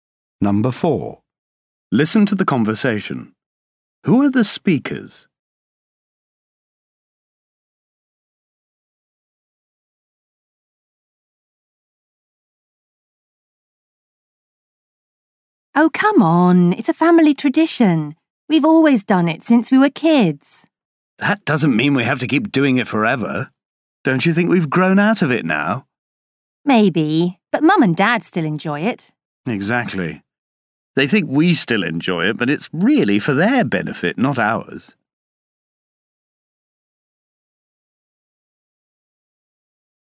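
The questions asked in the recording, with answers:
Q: Who are the speakers?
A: Brothers and/or sisters (siblings)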